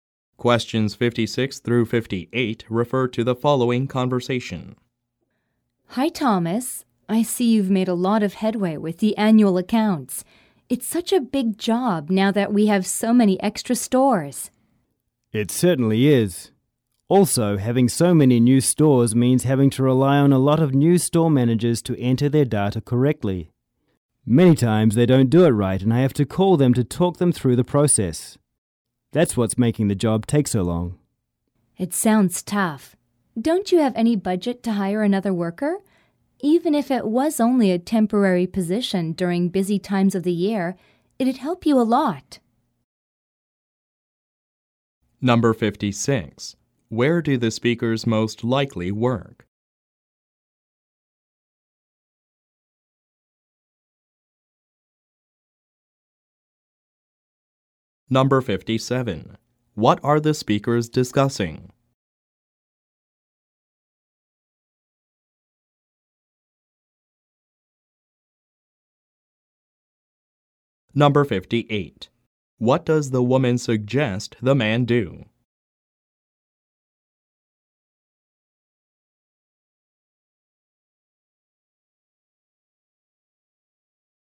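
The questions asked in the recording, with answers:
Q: What are the speakers discussing?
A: The difficulty of preparing the annual accounts

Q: What does the woman suggest the man do?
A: Hire a temporary worker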